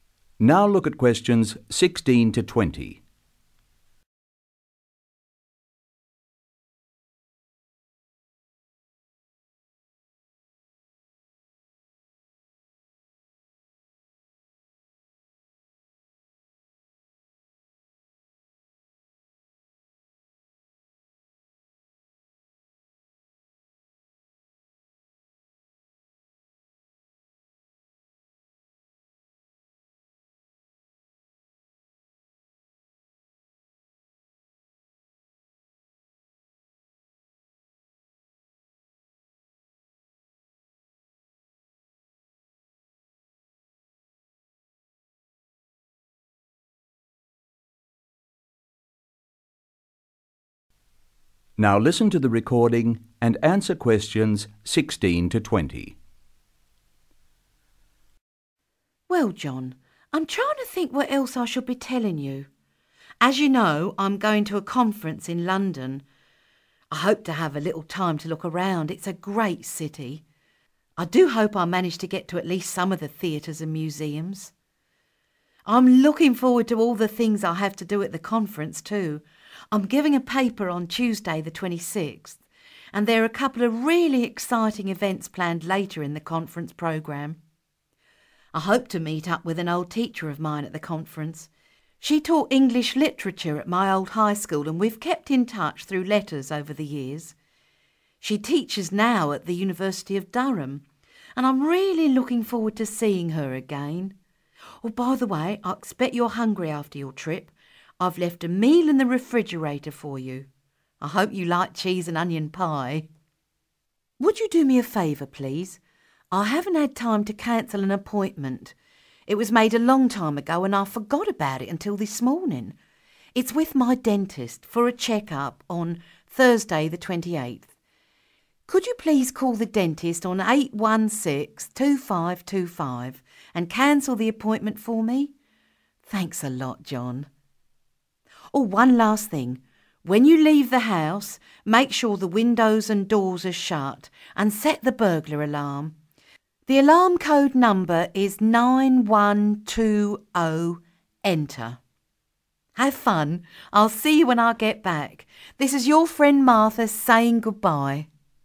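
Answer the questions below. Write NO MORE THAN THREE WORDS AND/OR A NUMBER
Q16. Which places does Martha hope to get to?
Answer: theatres and museums

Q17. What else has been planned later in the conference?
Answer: exciting events

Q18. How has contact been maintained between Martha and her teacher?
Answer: through letters

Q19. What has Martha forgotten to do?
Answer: cancel an appointment

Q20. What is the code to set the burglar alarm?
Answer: 9120 ENTER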